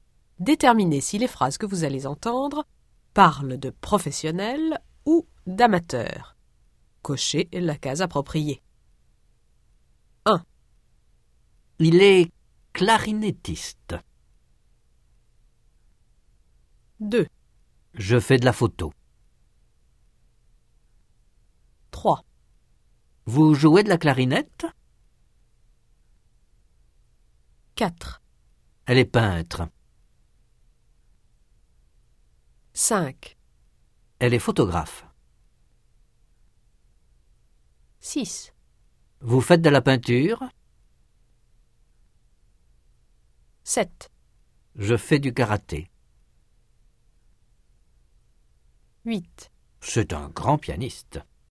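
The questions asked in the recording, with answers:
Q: Il est clarinettiste.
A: professionnel

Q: Je fais de la photo.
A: amateur

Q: Vous jouez de la clarinette?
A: amateur

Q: Elle est peintre.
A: professionnel

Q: Elle est photographe.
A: professionnel

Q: Vous faites de la peinture?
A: amateur

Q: Je fais du karaté.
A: amateur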